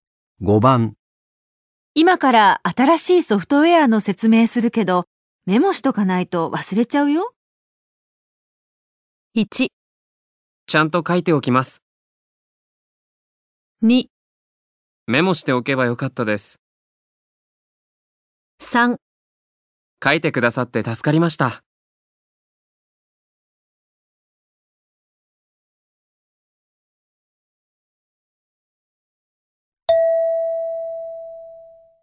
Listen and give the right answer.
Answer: 1

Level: N2 Listening · Test 3